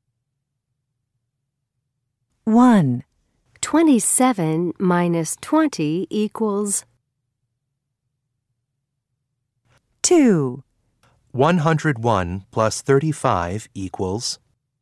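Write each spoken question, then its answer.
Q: 101 plus 35 equals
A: 136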